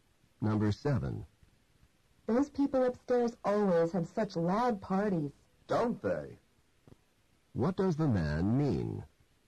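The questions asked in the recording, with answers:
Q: What does the man mean?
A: He agrees the upstairs parties are loud.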